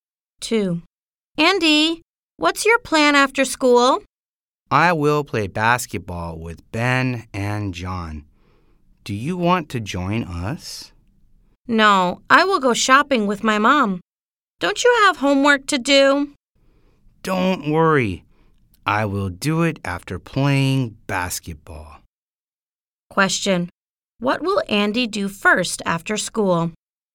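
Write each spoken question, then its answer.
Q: Question. What will Andy do first after school?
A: Play basketball with Ben and John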